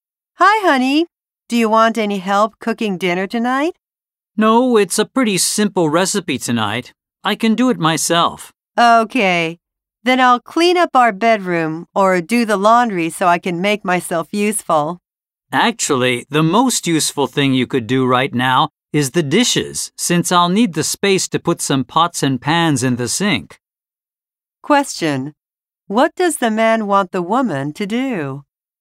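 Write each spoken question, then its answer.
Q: What does the man want the woman to do?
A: Do the dishes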